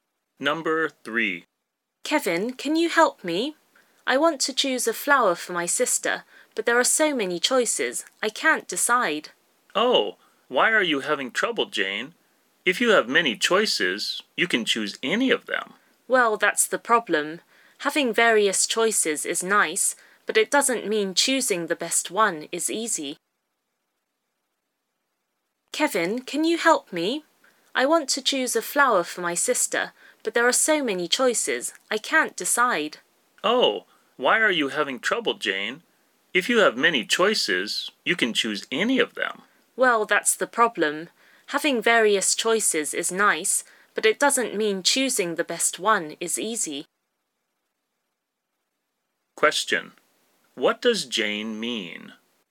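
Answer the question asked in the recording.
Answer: Having many choices makes it hard to choose the best one.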